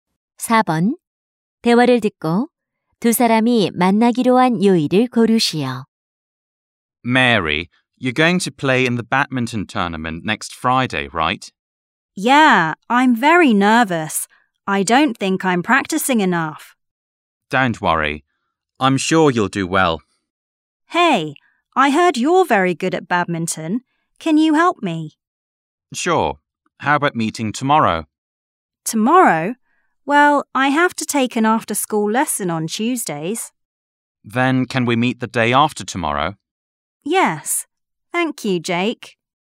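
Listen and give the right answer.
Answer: 수요일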